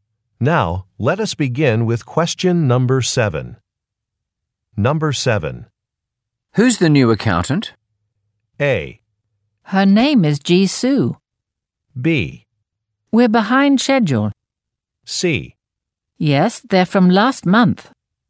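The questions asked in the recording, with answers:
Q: Who's the new accountant?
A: A: Her name is Jisoo.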